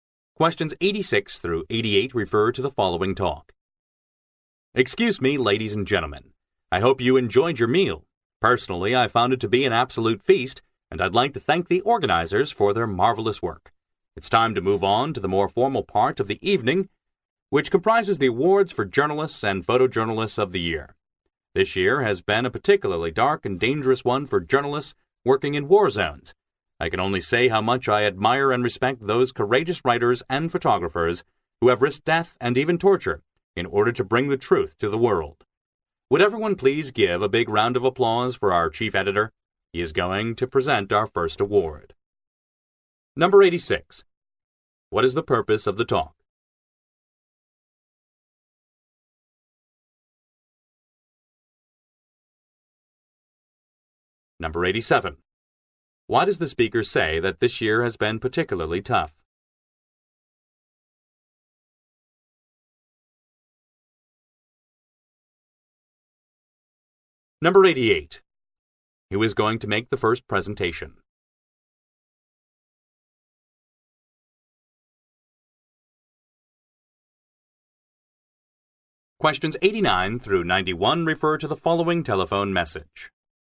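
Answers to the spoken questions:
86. To introduce the awards for journalists and photojournalists
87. It was dangerous for journalists in war zones
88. The chief editor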